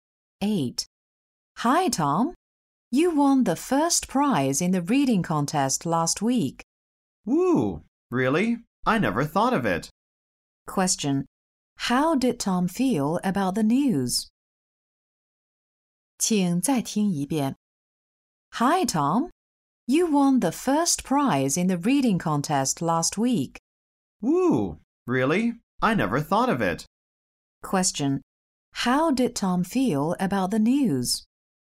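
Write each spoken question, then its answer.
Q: How did Tom feel about the news?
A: Surprised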